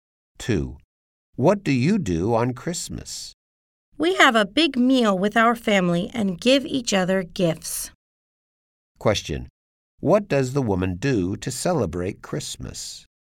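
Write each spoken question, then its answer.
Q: What does the woman do to celebrate Christmas?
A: Has a big meal with family and gives gifts.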